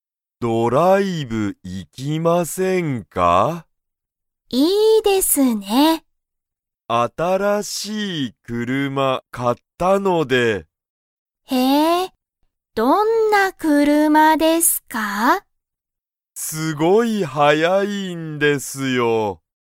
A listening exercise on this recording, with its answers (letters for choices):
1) 森(もり)さんと川島(かわしま)さんは、ドライブに行(い)きますか?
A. はい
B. いいえ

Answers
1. A

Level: Level 1